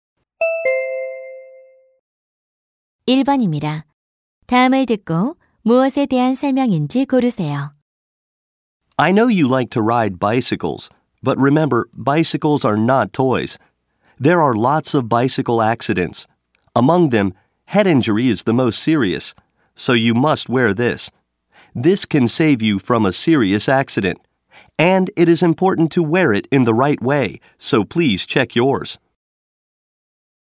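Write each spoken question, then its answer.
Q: 다음을 듣고 무엇에 대한 설명인지 고르세요.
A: 헬멧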